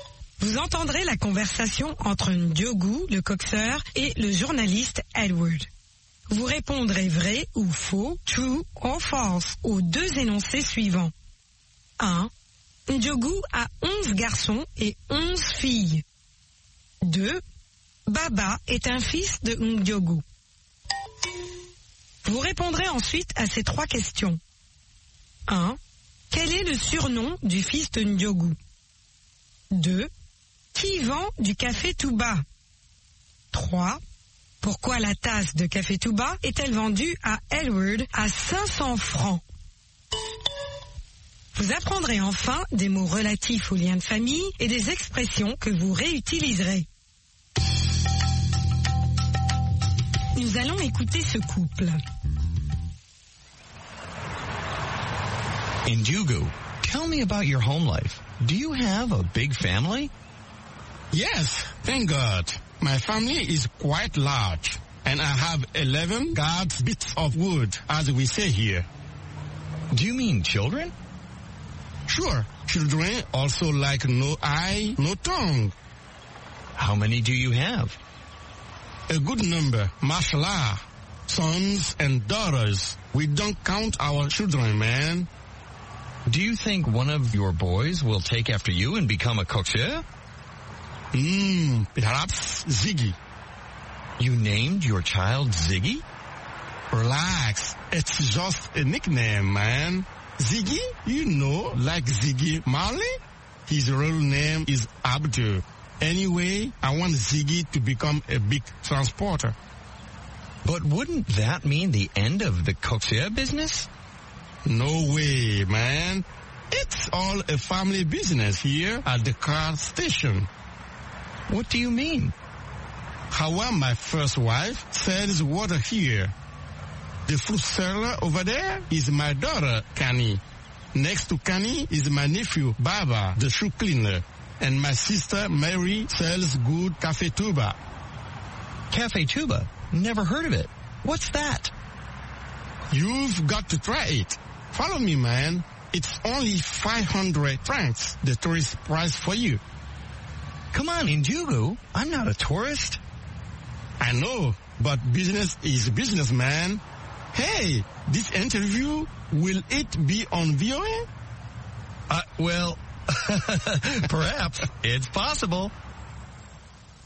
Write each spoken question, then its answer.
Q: 1. Ndiogo a 11 garçons et 11 filles.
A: L'énoncé 1 est faux.

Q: 2. Baba est un fils de Ndiogo.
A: L'énoncé 2 est faux.

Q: 1. Quel est le surnom du fils de Ndiogo?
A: Ziggy.

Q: 2. Qui vend du café tout bas?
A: Marie, la sœur de Ndiogou.

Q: 3. Pourquoi la tasse de café tout bas est-elle vendue à Edward à 500 francs?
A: C'est le prix pour touristes.